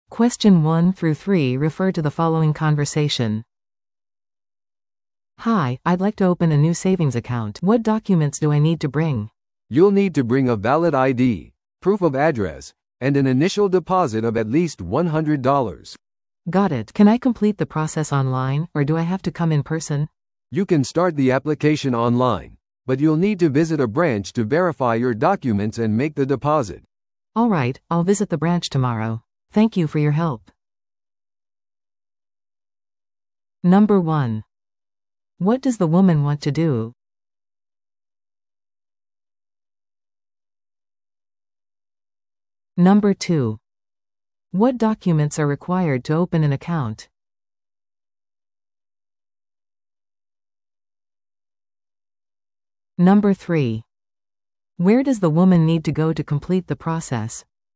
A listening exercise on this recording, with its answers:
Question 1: What does the woman want to do?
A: 普通預金口座を開設する

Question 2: What documents are required to open an account?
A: 身分証明書と住所証明書

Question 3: Where does the woman need to go to complete the process?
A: 銀行の支店

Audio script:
A: "Hi, I'd like to open a new savings account. What documents do I need to bring?"
B: "You'll need to bring a valid ID, proof of address, and an initial deposit of at least $100."
A: "Got it. Can I complete the process online, or do I have to come in person?"
B: "You can start the application online, but you'll need to visit a branch to verify your documents and make the deposit."
A: "Alright, I'll visit the branch tomorrow. Thank you for your help!"